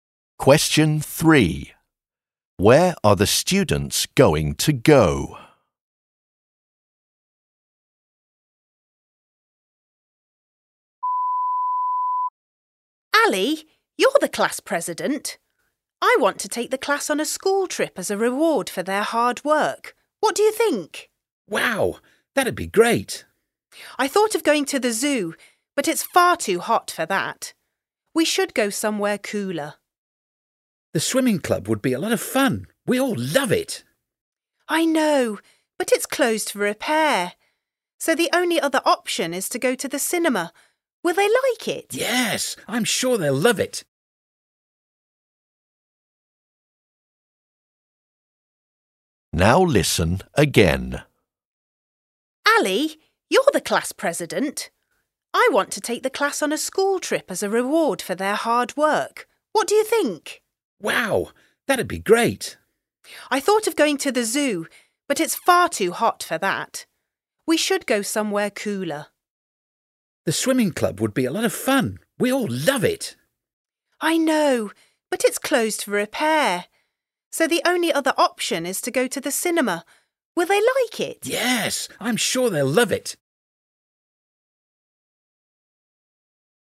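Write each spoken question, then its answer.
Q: Where are the students going to go?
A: To the cinema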